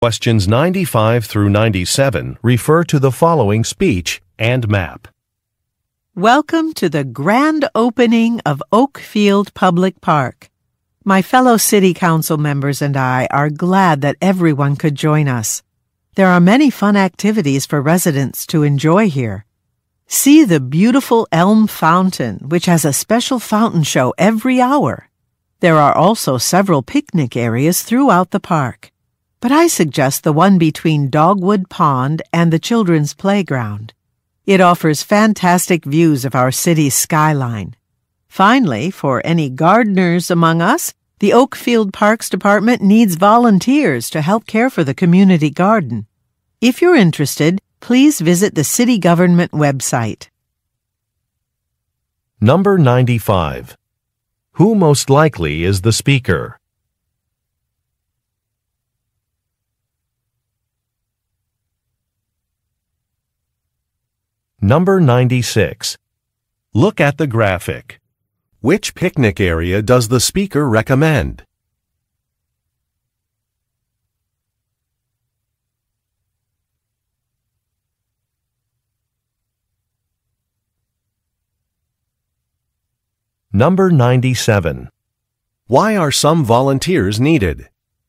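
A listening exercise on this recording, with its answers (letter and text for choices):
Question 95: Who most likely is the speaker?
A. A tour guide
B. A city official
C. A photographer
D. A landscape artist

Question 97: Why are some volunteers needed?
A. To maintain a garden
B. To hand out water bottles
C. To organize park events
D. To provide free tours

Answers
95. B. A city official
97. A. To maintain a garden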